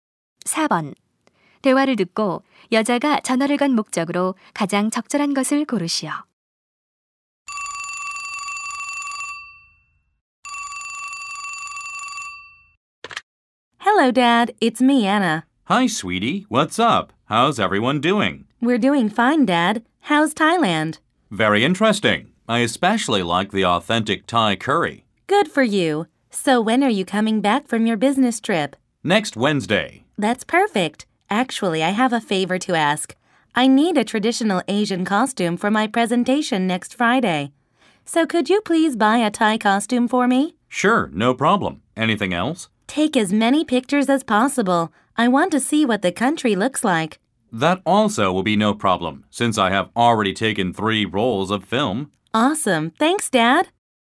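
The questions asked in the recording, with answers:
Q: 대화를 듣고 여자가 전화를 건 목적으로 가장 적절한 것을 고르시오.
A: 태국 전통 의상을 사다 달라고 부탁하려고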